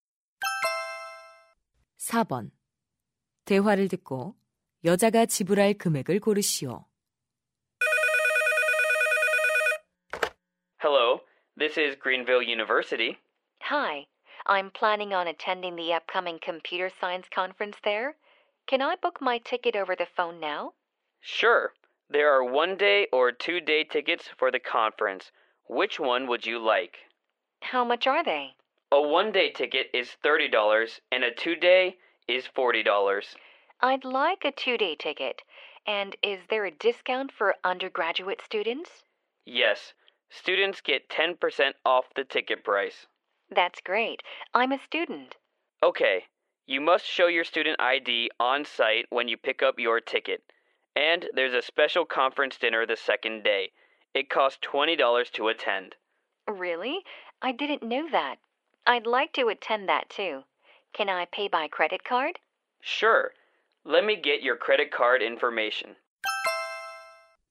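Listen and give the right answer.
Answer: 56달러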